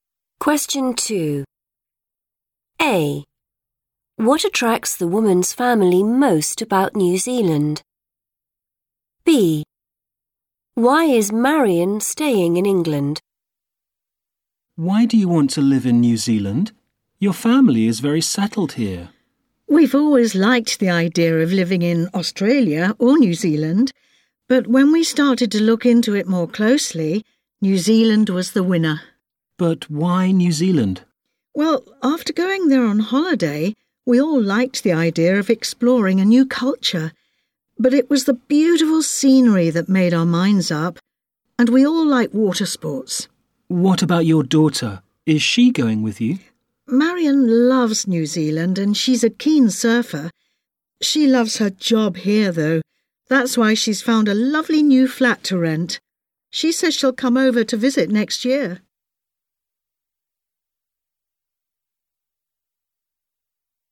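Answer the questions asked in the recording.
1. the beautiful scenery
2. she loves her job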